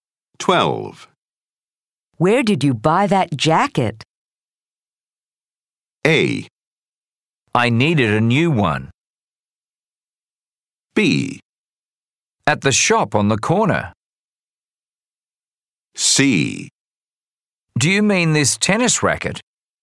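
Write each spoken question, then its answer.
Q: Where did you buy that jacket?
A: B: At the shop on the corner.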